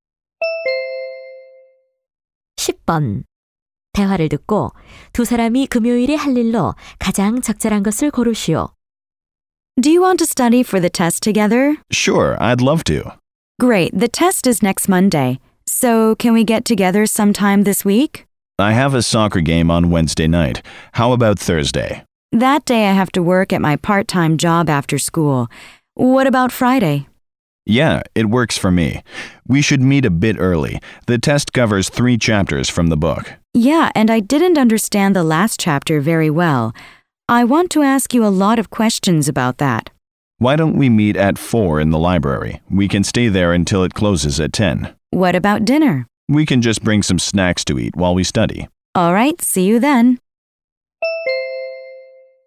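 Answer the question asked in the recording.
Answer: 도서관에서 함께 시험공부하기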